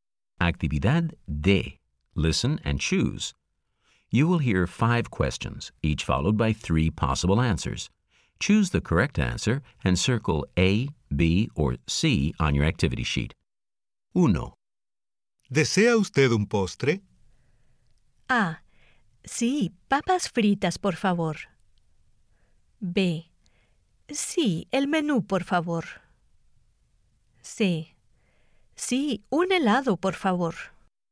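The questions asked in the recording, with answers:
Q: ¿Desea usted un postre?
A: C: Sí, un helado, por favor.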